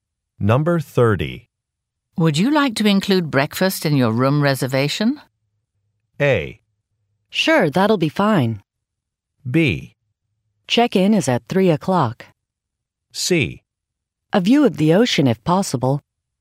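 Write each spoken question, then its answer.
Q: Would you like to include breakfast in your room reservation?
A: A: Sure, that'll be fine.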